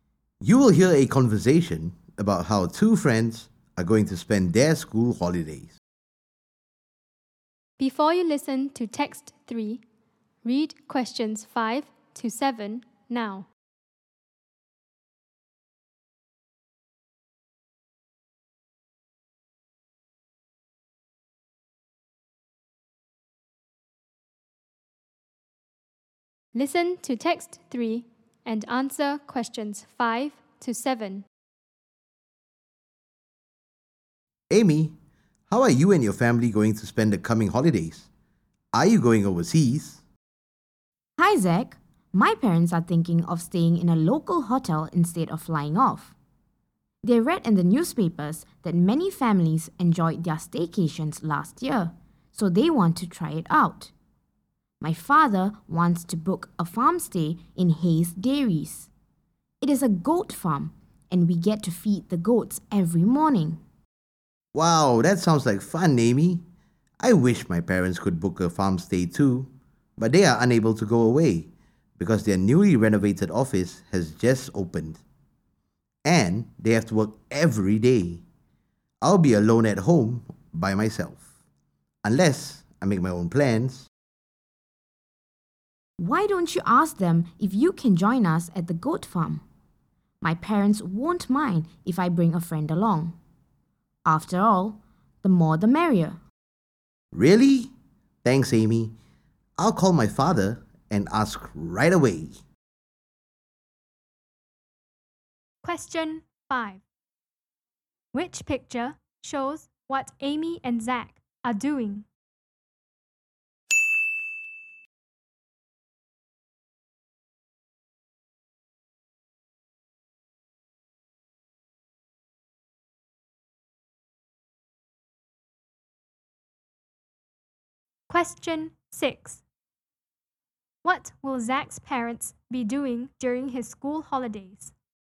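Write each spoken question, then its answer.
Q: What will Zach's parents be doing during his school holidays?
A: Working every day at their newly renovated office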